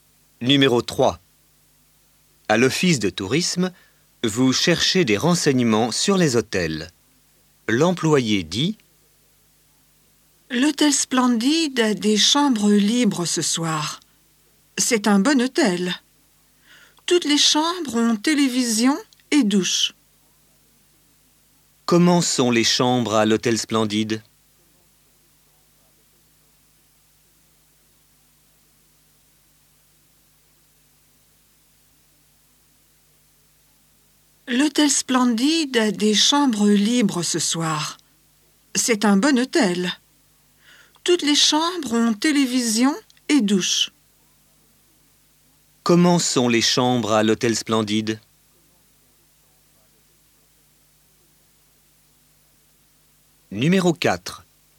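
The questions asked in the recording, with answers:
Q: Comment sont les chambres à l'hôtel Splendid?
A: Elles ont toutes télévision et douche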